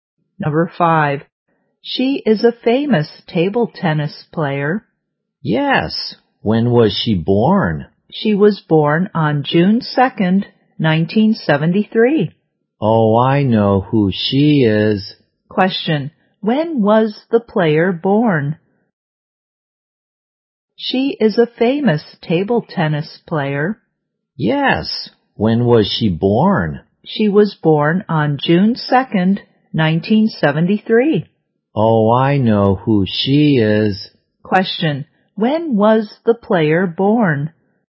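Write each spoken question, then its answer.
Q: When was the player born?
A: June 2nd, 1973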